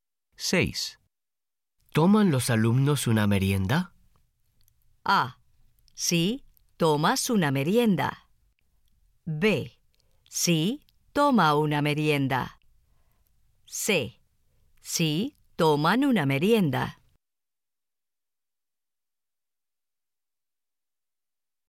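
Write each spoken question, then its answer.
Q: ¿Toman los alumnos una merienda?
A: C: Sí, toman una merienda.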